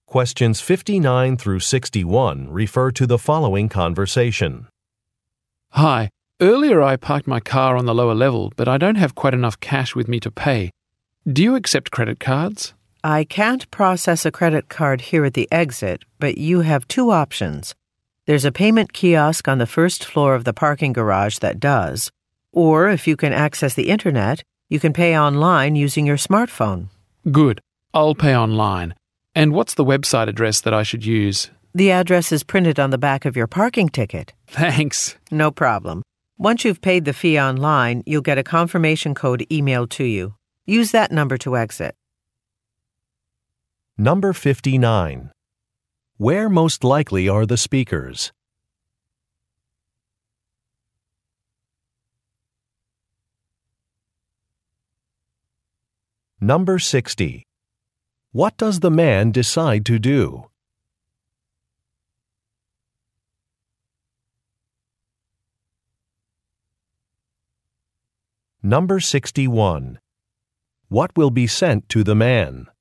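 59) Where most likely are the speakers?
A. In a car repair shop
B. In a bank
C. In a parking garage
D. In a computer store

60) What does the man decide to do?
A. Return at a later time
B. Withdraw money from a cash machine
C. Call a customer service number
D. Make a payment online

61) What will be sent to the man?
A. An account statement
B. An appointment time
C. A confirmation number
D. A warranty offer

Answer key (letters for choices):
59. C
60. D
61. C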